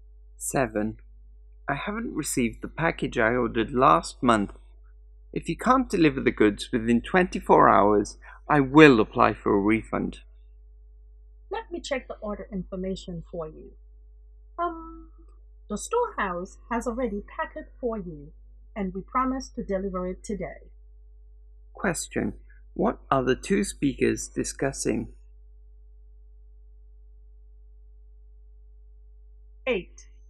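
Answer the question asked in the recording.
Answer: A delayed package delivery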